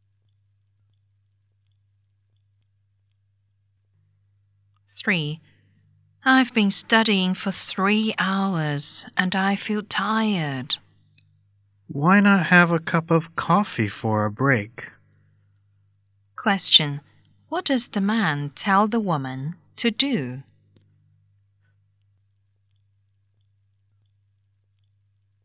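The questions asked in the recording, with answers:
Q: What does the man tell the woman to do?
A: Have a cup of coffee for a break.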